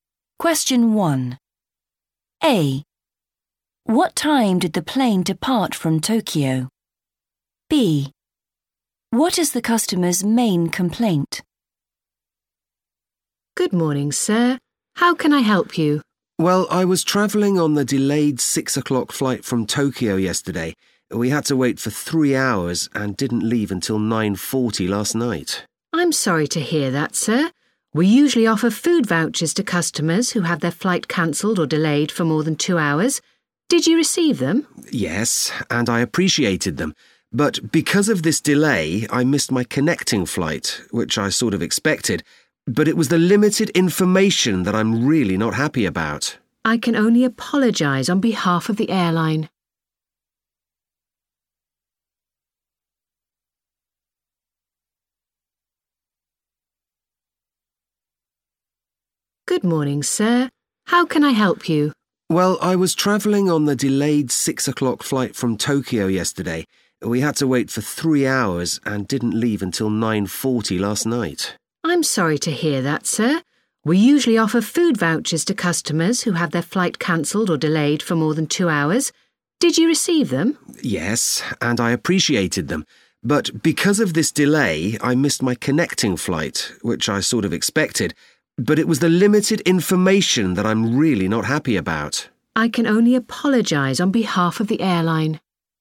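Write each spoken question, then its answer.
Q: What time did the plane depart from Tokyo?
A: 9:40 (last night)

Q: What is the customer's main complaint?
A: limited information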